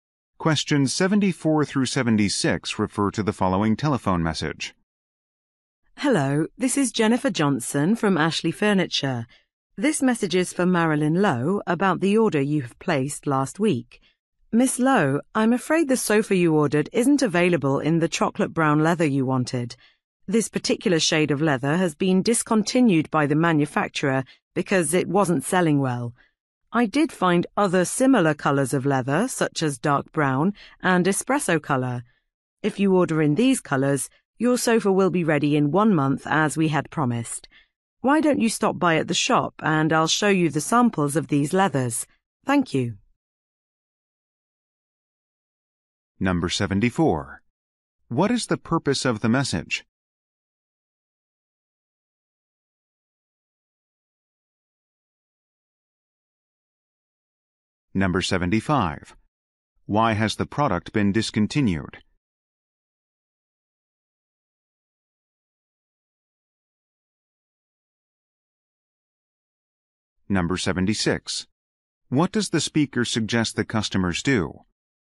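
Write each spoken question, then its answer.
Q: What is the purpose of the message?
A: To say the ordered sofa color is unavailable

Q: Why has the product been discontinued?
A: It wasn't selling well

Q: What does the speaker suggest the customers do?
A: Stop by the shop to see leather samples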